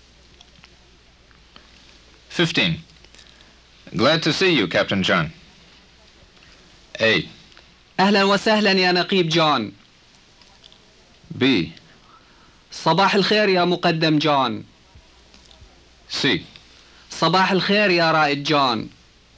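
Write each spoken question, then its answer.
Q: Glad to see you, Captain John.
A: A: أهلا وسهلا يا نقيب جون.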